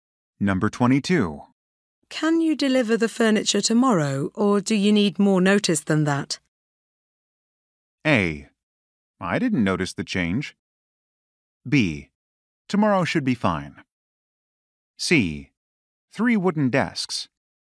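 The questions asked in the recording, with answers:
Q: Can you deliver the furniture tomorrow, or do you need more notice than that?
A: B: Tomorrow should be fine.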